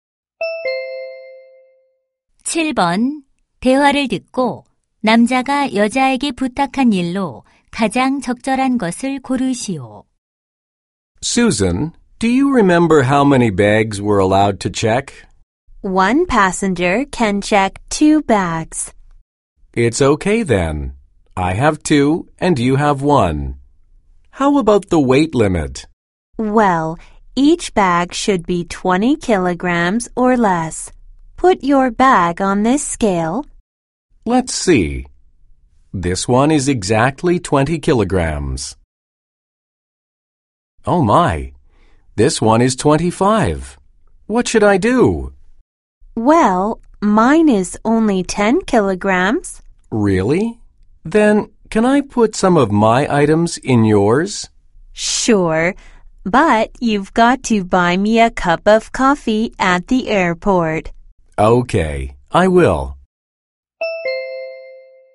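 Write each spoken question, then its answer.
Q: 대화를 듣고 남자가 여자에게 부탁한 일로 가장 적절한 것을 고르시오.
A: 자신의 짐 일부를 여자의 가방에 넣어 주기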